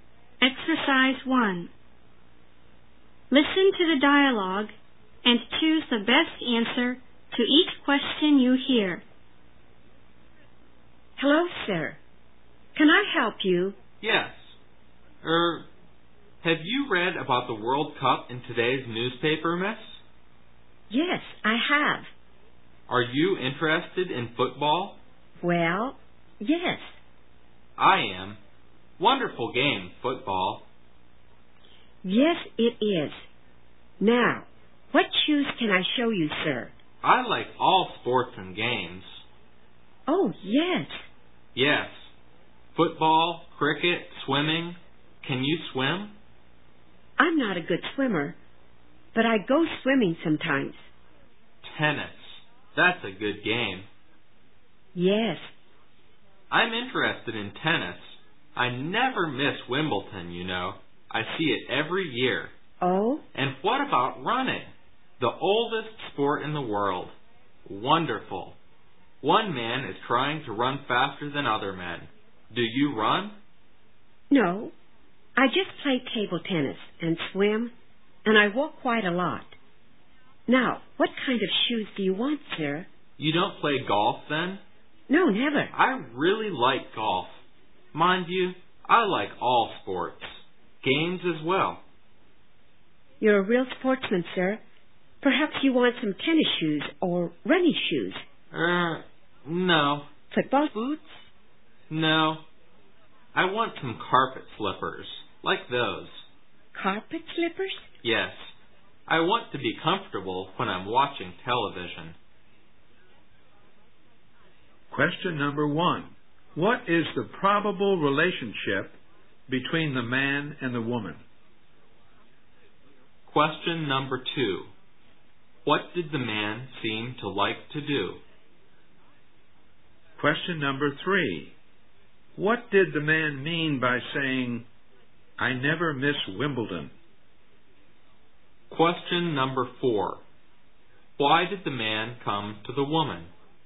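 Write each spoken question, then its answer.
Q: What is the probable relationship between the man and the woman?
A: Customer and shop assistant

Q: What did the man mean by saying, "I never miss Wimbledon"?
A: He watches Wimbledon every year

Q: Why did the man come to the woman?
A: To buy carpet slippers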